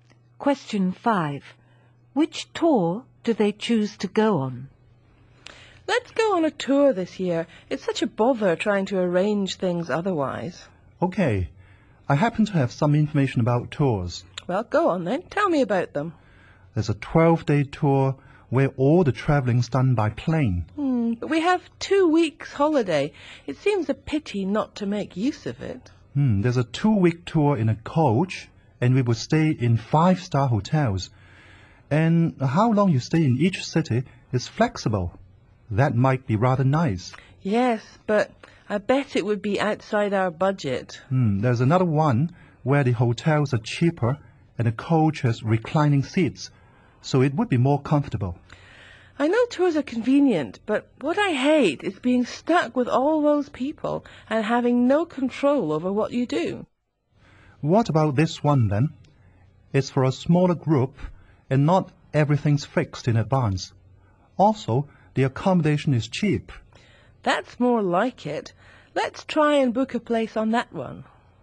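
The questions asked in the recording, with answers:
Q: Which tour do they choose to go on?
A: The small-group tour with cheap accommodation, where not everything is fixed in advance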